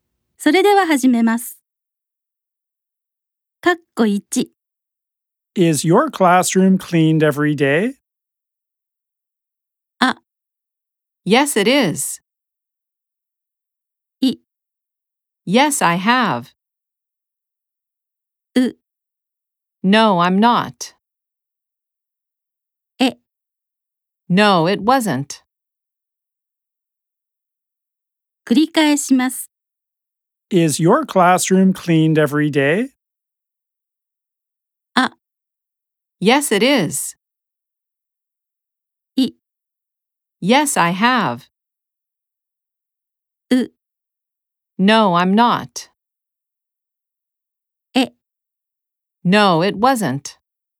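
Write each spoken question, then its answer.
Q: Is your classroom cleaned every day?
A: A: Yes, it is.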